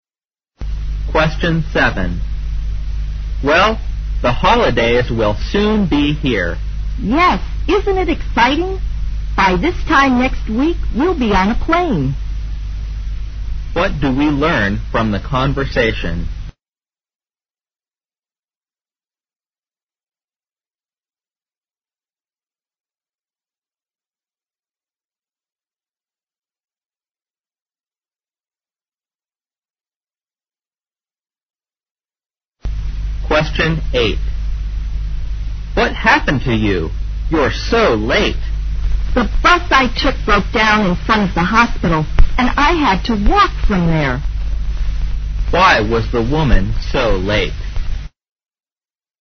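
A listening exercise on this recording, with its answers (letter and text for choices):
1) What do we learn from the conversation?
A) The woman doesn't think it exciting to travel by air.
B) They'll stay at home during the holidays.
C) They are offered some plane tickets for their holidays.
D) They'll be flying somewhere for their vacation.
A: D) They'll be flying somewhere for their vacation.

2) Why was the woman so late?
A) Something went wrong with the bus.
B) She took somebody to hospital.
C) Something prevented her from catching the bus.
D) She came on foot instead of taking a bus.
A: A) Something went wrong with the bus.

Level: 大学英语四级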